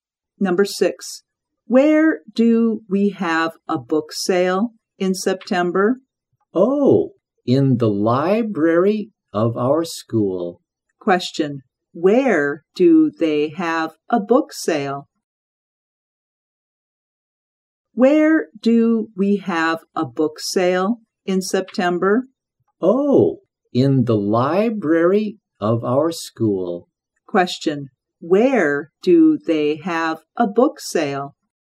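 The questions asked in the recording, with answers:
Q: Question, where do they have a book sale?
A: In the library of their school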